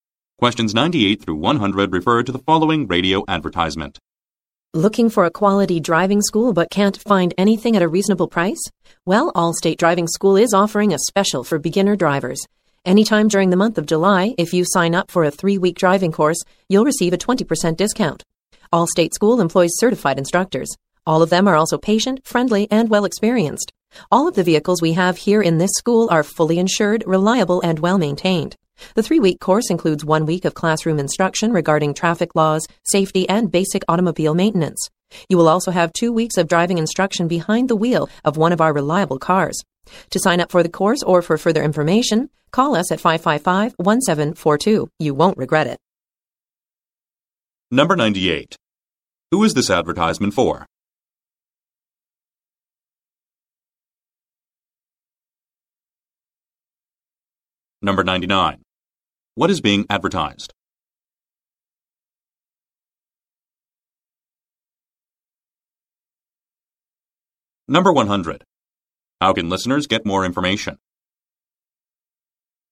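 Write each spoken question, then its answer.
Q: Who is this advertisement for?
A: Beginner drivers

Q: What is being advertised?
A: A driving course at a 20% discount

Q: How can listeners get more information?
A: By calling 555-1742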